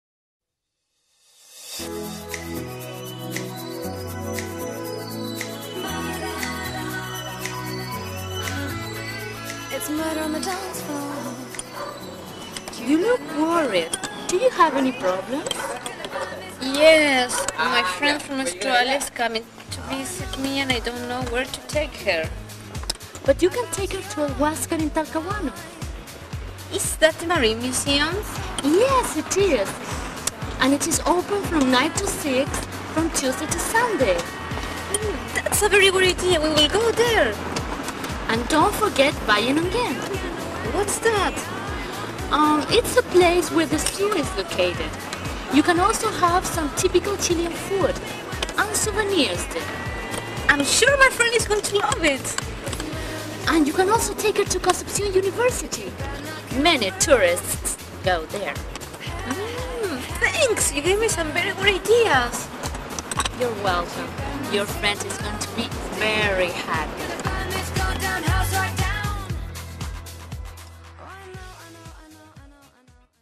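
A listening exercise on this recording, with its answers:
Answer the questions based on the audio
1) What is she bored about?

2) Where does the girl suggest going?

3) And what can you do there?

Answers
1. She doesn't know where to take her friend from Australia who is coming to visit.
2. The Huascar (Marine Museum) in Talcahuano, Bayanon again, and Concepcion University.
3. See the zoo and have typical Chilean food and buy souvenirs.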